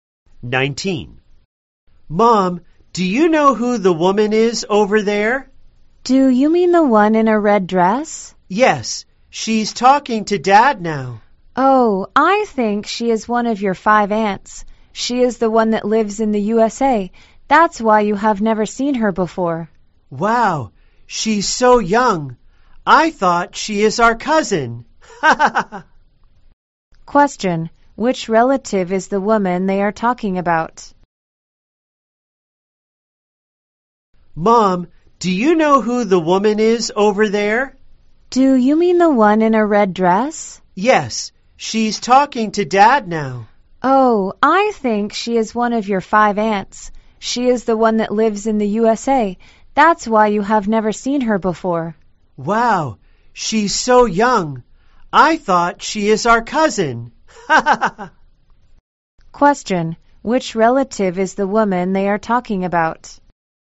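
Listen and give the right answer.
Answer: The child's aunt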